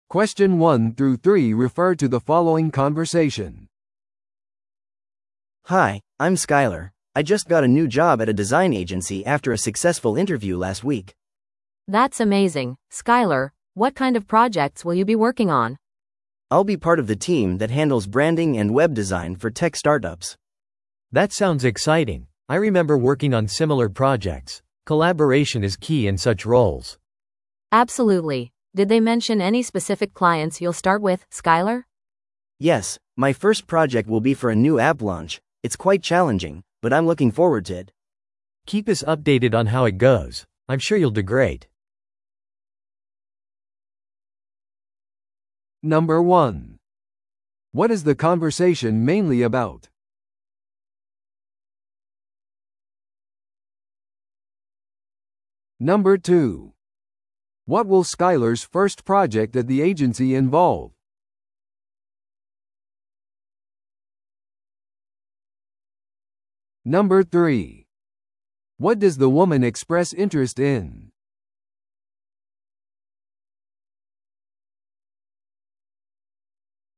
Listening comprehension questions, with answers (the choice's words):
Listen to the audio below and answer the questions.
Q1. What is the conversation mainly about?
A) 今後のデザイン会議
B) テックスタートアップからのジョブオファー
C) デザインエージェンシーでの新しい仕事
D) 新しいアプリのウェブデザインプロジェクト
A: デザインエージェンシーでの新しい仕事

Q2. What will Skyler's first project at the agency involve?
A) テック雑誌との調整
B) 新しい広告キャンペーンの開始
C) 新しいデザイナーのトレーニング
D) 新しいアプリのローンチのためのデザイン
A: 新しいアプリのローンチのためのデザイン

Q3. What does the woman express interest in?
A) デザインエージェンシーに参加する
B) アプリのローンチについて学ぶ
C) スカイラーの進捗情報を得る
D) デザイン技術について話し合う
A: スカイラーの進捗情報を得る

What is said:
I just got a new job at a design agency after a successful interview last week!
B: That's amazing, Skyler! What kind of projects will you be working on?
A: I'll be part of the team that handles branding and web design for tech startups.
C: That sounds exciting! I remember working on similar projects. Collaboration is key in such roles.
B: Absolutely. Did they mention any specific clients you'll start with, Skyler?
A: Yes, my first project will be for a new app launch. It's quite challenging, but I'm looking forward to it!
C: Keep us updated on how it goes. I'm sure you'll do great!